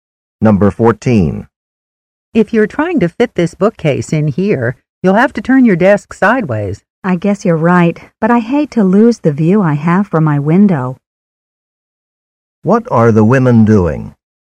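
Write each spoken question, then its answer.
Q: What are the women doing?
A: Rearranging furniture in a room.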